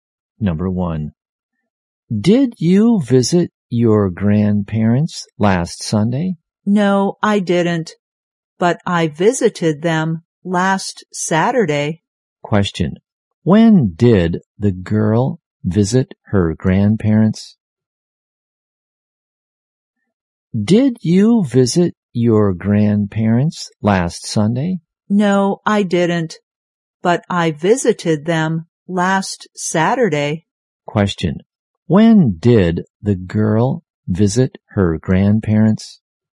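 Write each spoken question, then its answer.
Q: when did the girl visit her grandparents?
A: Last Saturday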